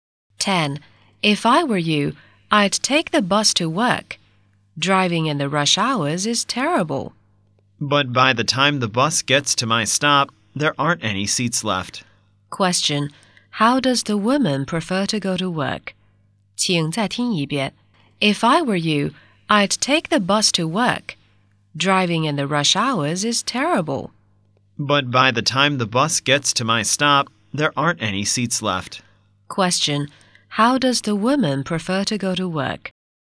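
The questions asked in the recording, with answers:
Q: How does the woman prefer to go to work?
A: By car (driving)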